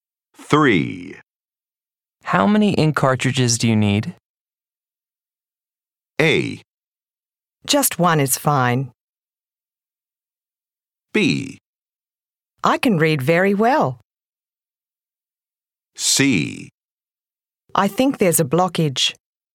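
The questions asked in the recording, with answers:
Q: How many ink cartridges do you need?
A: A: Just one is fine.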